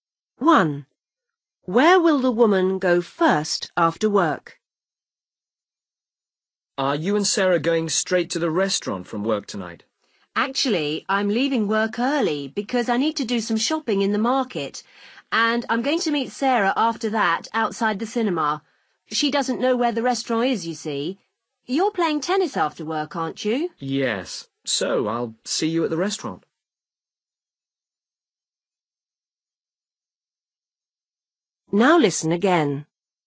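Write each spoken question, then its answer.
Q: Where will the woman go first after work?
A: the market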